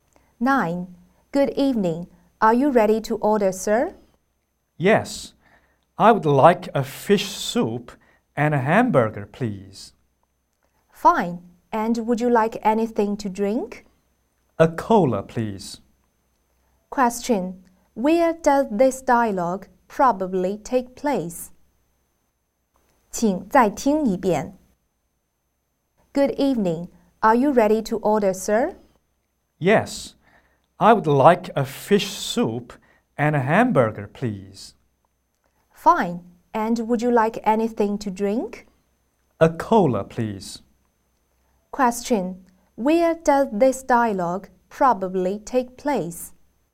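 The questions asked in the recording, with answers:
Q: Where does this dialogue probably take place?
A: In a restaurant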